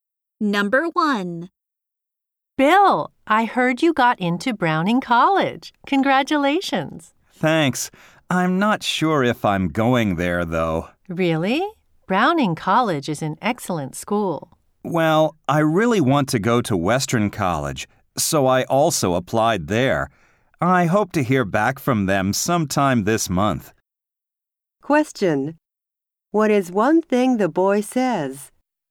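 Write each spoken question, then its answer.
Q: What is one thing the boy says?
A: He really wants to go to Western College and is waiting to hear back from it.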